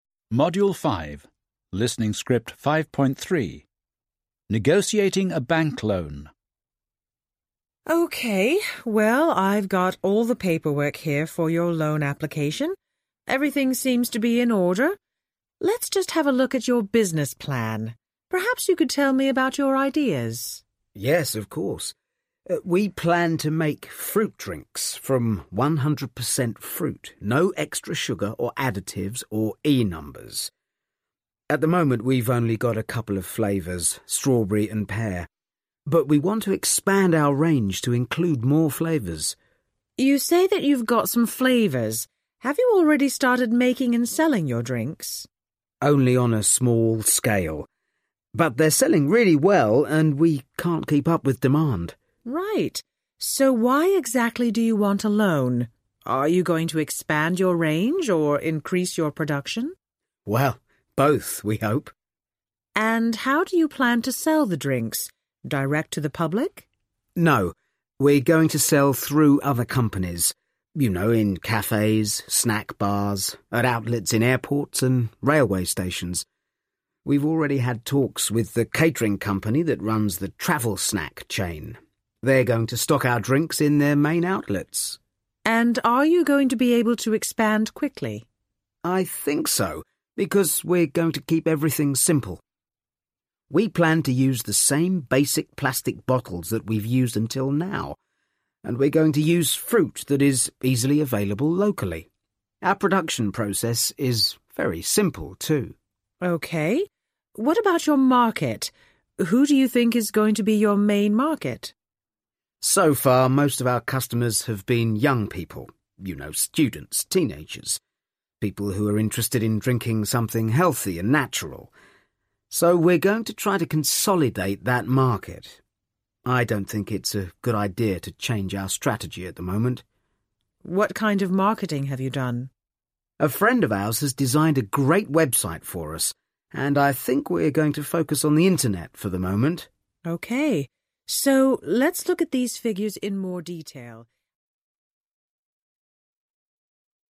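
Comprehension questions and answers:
Listen and answer questions:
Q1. Where does the woman work?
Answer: At a bank

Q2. What has the woman got all the paperwork for?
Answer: The man's loan application

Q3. What does the woman want to have a look at?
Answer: His business plan

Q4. What is the man's business plan?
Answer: To make fruit drinks from 100% fruit, with no extra sugar or additives

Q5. What fruit flavors has his business got at the moment?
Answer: Strawberry and pear

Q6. Has the man already started making and selling your drinks?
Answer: Yes, only on a small scale, but they are selling really well

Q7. Why exactly does the man want a loan?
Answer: To expand the range and increase production

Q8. How does the man plan to sell the drinks?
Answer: Through other companies: cafes, snack bars, outlets in airports and railway stations

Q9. Is his business going to be able to expand quickly? 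How?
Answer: Yes, by keeping everything simple: the same basic plastic bottles, locally available fruit and a simple production process

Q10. Who is going to be his main market?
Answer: Young people, such as students and teenagers interested in healthy, natural drinks

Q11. What kind of marketing has the man done?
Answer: A friend designed a website for them; they will focus on the internet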